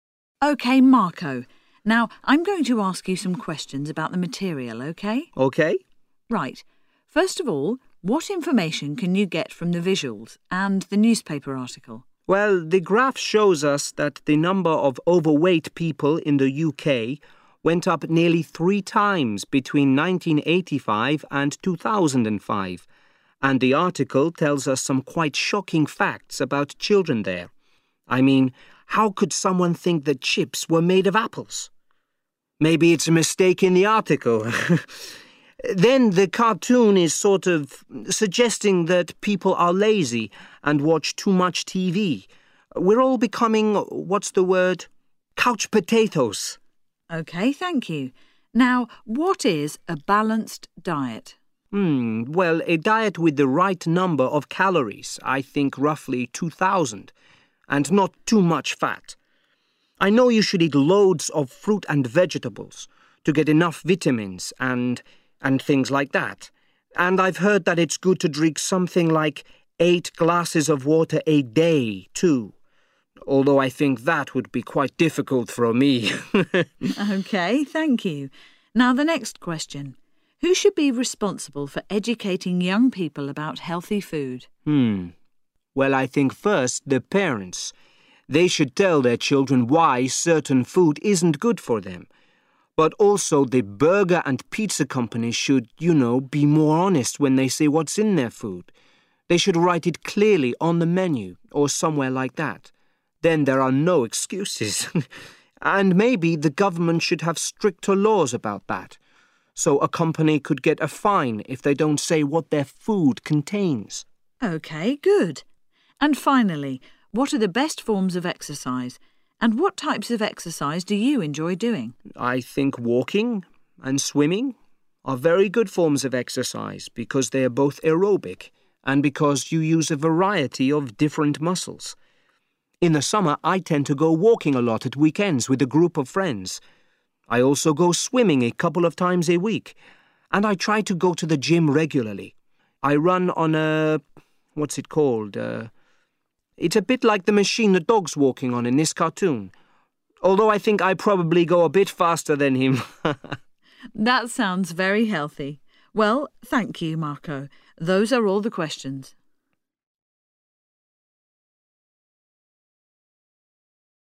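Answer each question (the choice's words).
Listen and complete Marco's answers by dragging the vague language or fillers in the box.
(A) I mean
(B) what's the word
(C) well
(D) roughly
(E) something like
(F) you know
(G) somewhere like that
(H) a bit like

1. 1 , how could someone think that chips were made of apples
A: I mean

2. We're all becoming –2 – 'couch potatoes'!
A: what's the word

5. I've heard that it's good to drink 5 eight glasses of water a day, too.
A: something like

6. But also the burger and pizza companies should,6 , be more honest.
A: you know

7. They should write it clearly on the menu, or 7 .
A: somewhere like that

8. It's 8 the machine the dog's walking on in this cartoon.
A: a bit like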